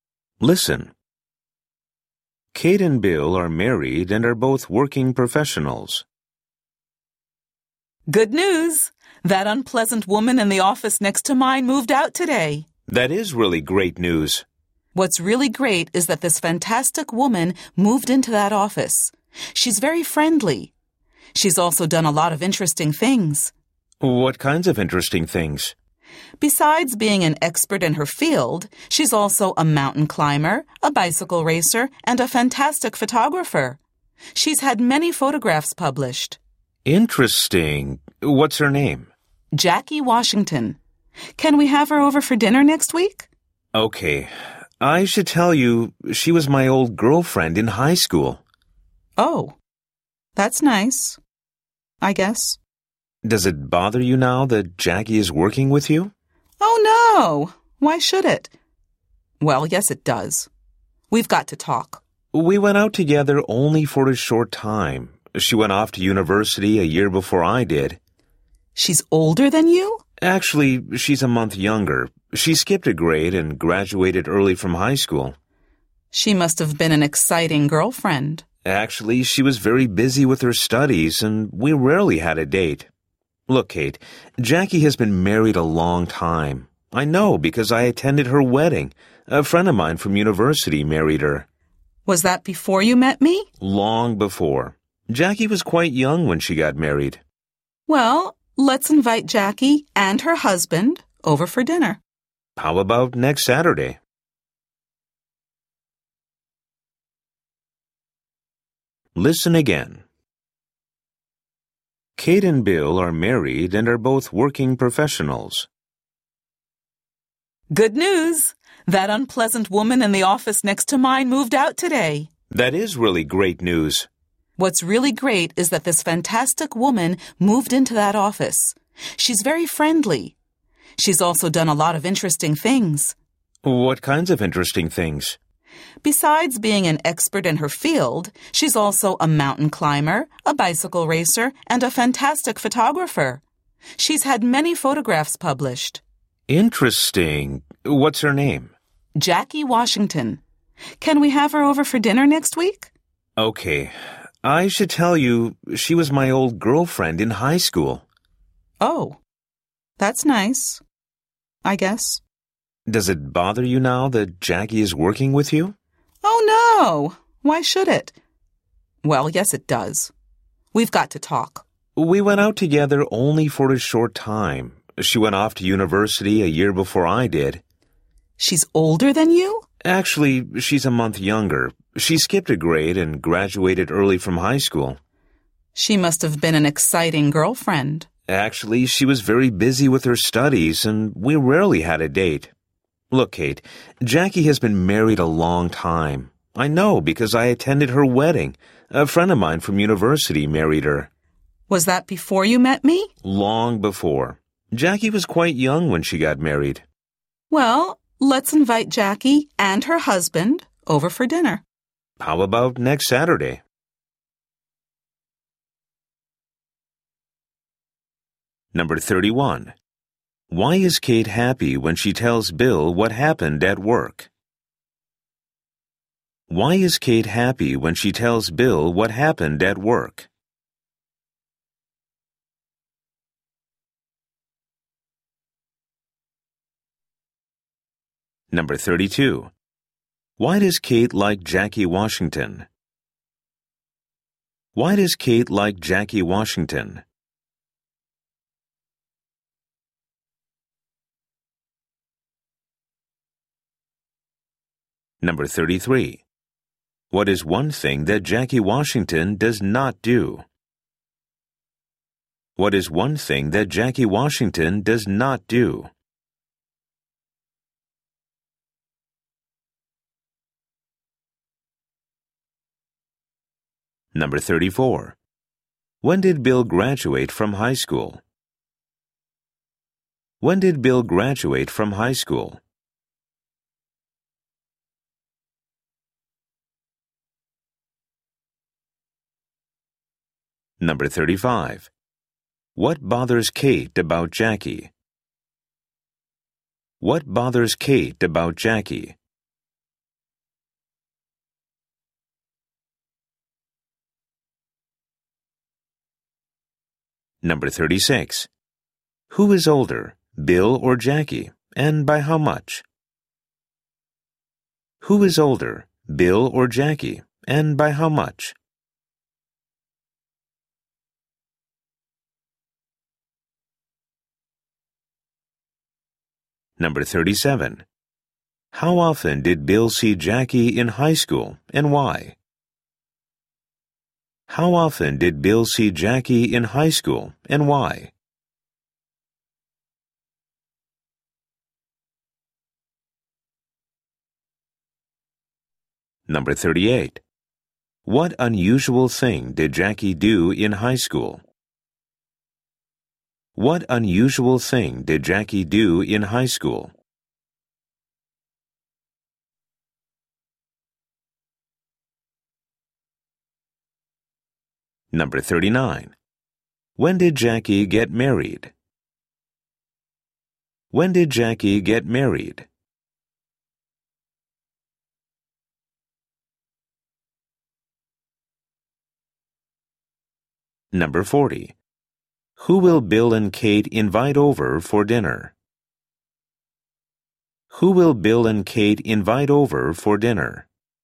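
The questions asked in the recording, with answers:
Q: Why is Kate happy when she tells Bill what happened at work?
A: An unpleasant woman moved out of the office next to hers and a fantastic woman moved in

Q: Why does Kate like Jackie Washington?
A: She is very friendly and has done many interesting things

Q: When did Bill graduate from high school?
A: A year after Jackie

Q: What bothers Kate about Jackie?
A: Jackie was Bill's girlfriend in high school

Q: Who is older, Bill or Jackie, and by how much?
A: Bill, by a month

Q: How often did Bill see Jackie in high school and why?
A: Rarely, because she was very busy with her studies

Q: What unusual thing did Jackie do in high school?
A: She skipped a grade and graduated early

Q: When did Jackie get married?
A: Long before Kate met Bill, when Jackie was quite young

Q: Who will Bill and Kate invite over for dinner?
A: Jackie and her husband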